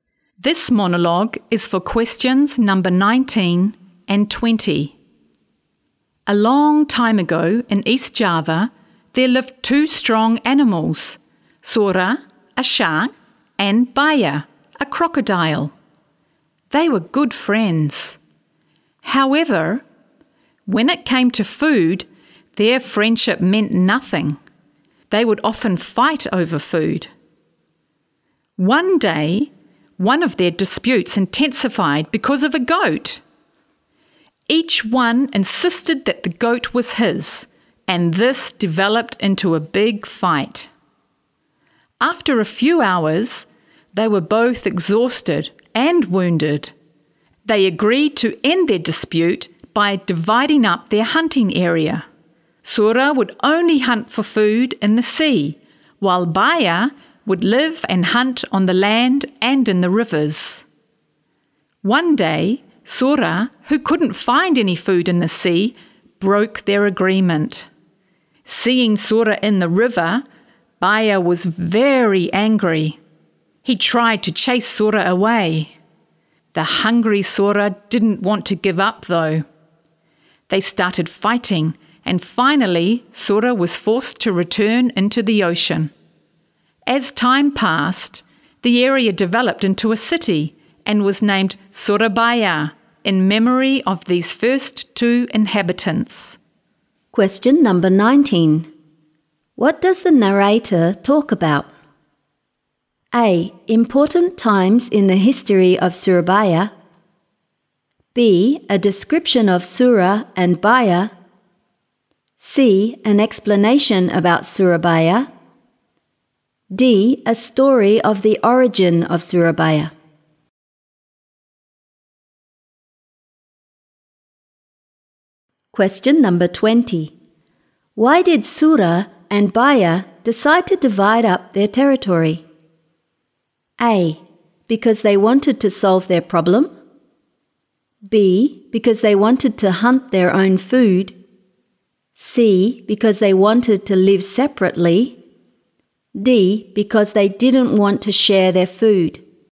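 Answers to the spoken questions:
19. D: A story of the origin of Surabaya.
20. A: Because they wanted to solve their problem.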